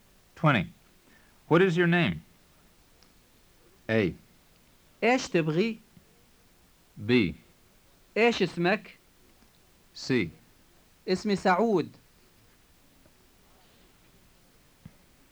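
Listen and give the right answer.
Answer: B: إيش اسمك؟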